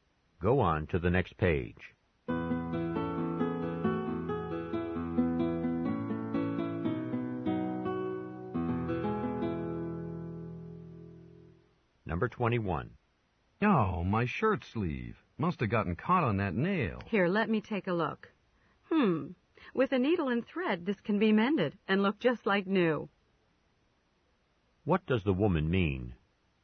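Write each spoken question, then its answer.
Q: What does the woman mean?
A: The shirt can be easily repaired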